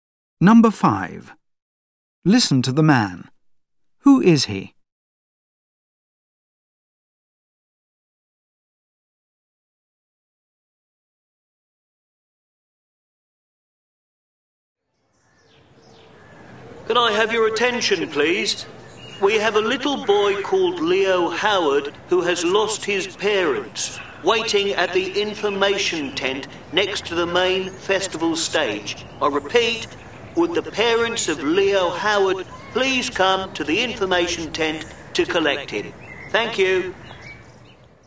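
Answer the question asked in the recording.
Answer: A festival announcer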